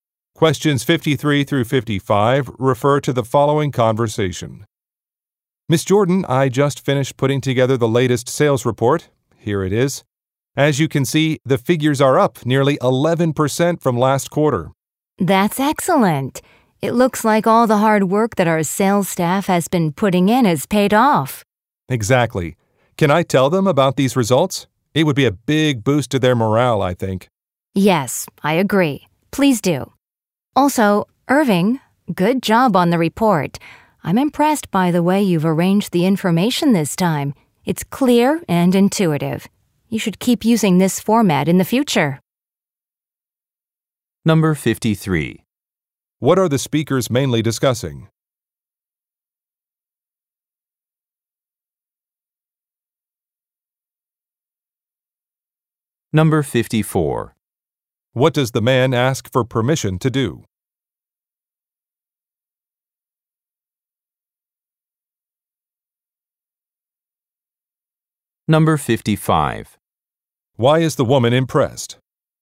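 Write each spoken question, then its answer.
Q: What are the speakers mainly discussing?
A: The latest sales report

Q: What does the man ask for permission to do?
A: Tell the sales staff about the results

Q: Why is the woman impressed?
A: The report's information is arranged clearly and intuitively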